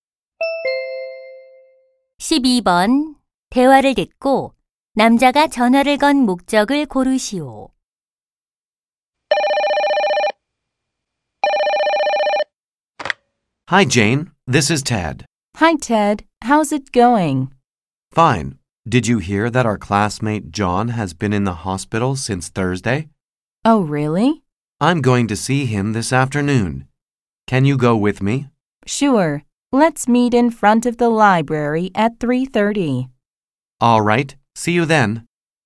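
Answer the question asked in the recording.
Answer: 입원한 친구 병문안을 같이 가자고 하려고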